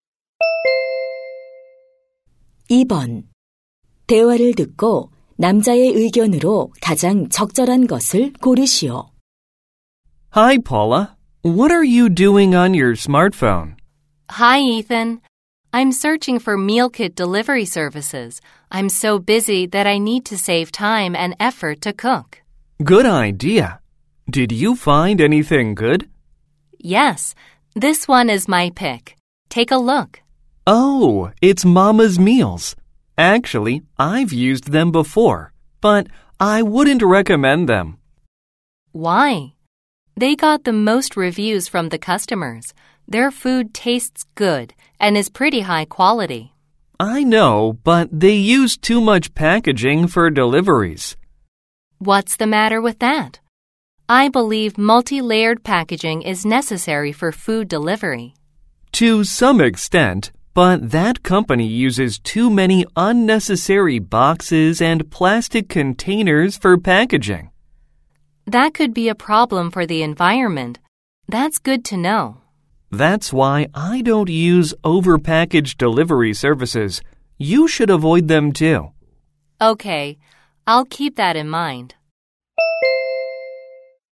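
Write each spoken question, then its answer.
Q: 대화를 듣고 남자의 의견으로 가장 적절한 것을 고르시오.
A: 과대 포장하는 배달 서비스는 이용하지 말아야 한다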